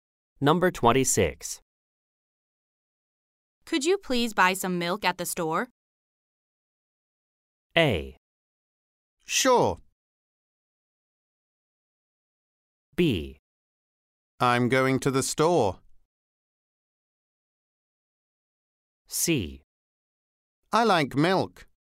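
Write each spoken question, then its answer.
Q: Could you please buy some milk at the store?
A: A: Sure.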